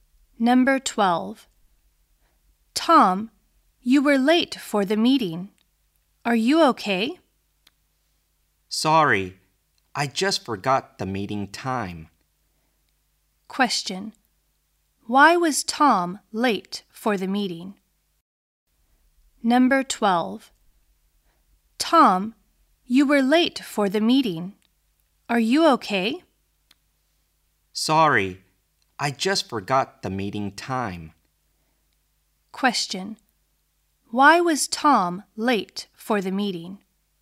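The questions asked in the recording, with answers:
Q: Why was Tom late for the meeting?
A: He forgot the meeting time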